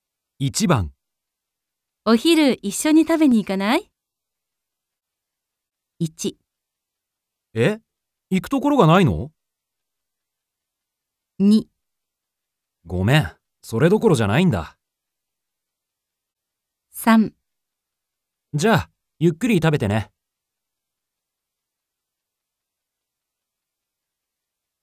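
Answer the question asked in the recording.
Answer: 2: ごめん、それどころじゃないんだ。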